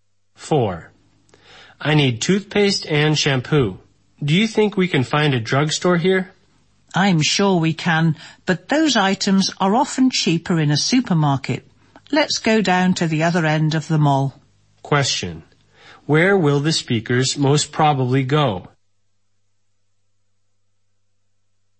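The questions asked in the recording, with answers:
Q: Where will the speakers most probably go?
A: To a supermarket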